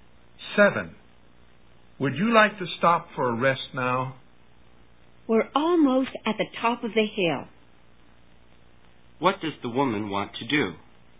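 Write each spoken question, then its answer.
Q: What does the woman want to do?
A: Keep going to the top of the hill before resting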